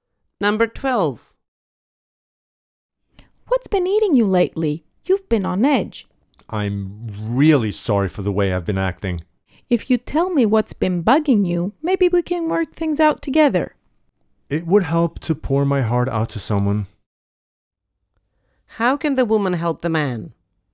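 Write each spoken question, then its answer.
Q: How can the woman help the man?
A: By listening to his problems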